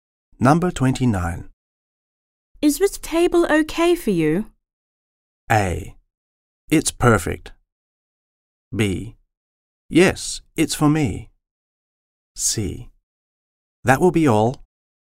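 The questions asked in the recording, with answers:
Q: Is this table okay for you?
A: A: It's perfect.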